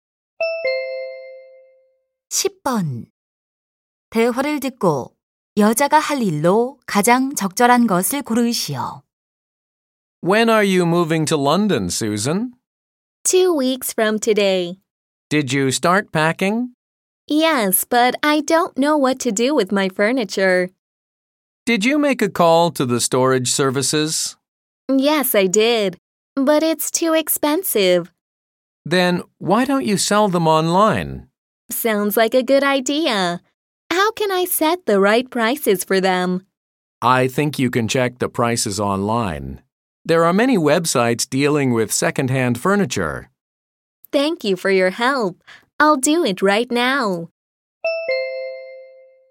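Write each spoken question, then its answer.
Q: 대화를 듣고 여자가 할 일로 가장 적절한 것을 고르시오.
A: 온라인에서 중고 가구 가격 확인하기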